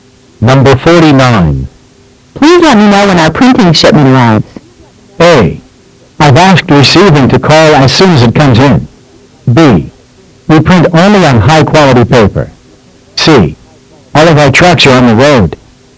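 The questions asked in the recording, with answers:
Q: Please let me know when our printing shipment arrives.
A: A: I've asked receiving to call as soon as it comes in.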